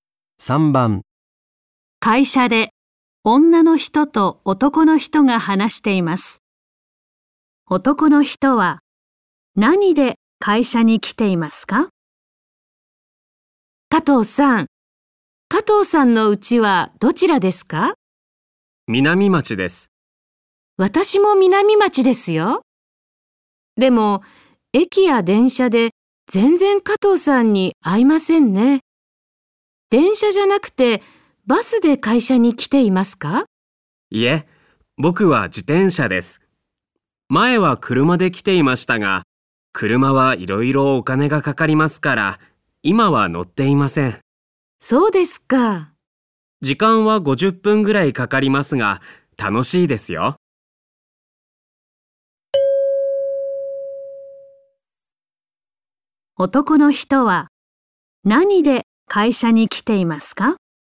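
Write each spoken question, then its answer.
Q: 男の人は何で会社に来ていますか?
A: 自転車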